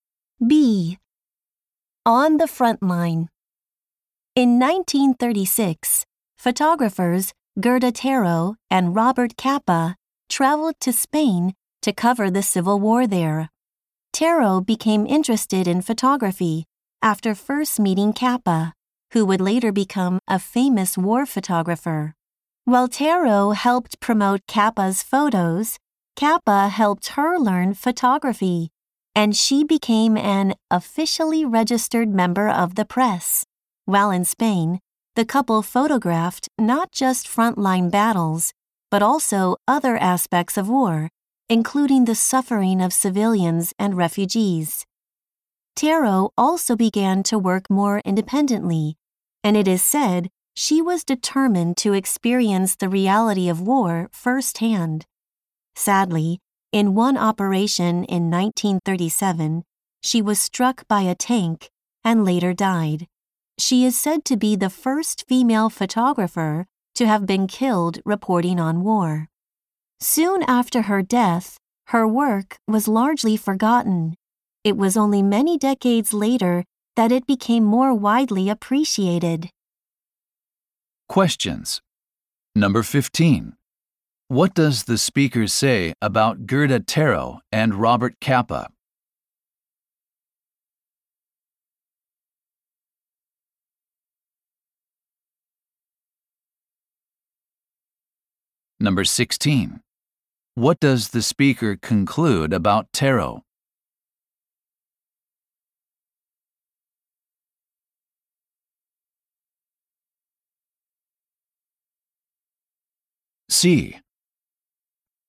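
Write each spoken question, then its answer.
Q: What does the speaker say about Gerda Taro and Robert Capa?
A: They helped each other: Capa taught Taro photography and she promoted his photos

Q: What does the speaker conclude about Taro?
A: Her work was forgotten after her death and only appreciated decades later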